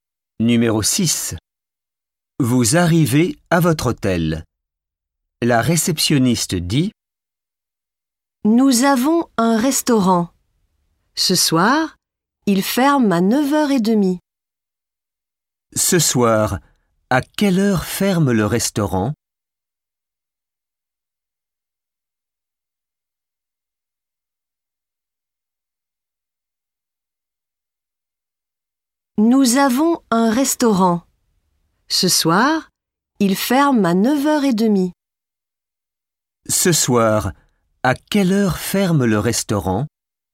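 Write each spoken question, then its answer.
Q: Ce soir, à quelle heure ferme le restaurant ?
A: À 9h30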